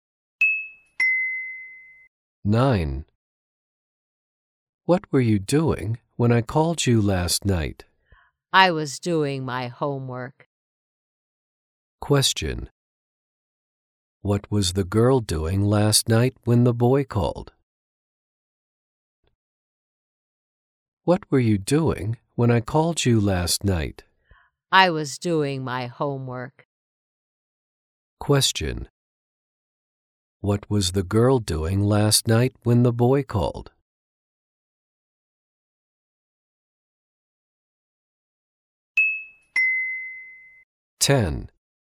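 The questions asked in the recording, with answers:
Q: What was the girl doing last night when the boy called?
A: She was doing her homework.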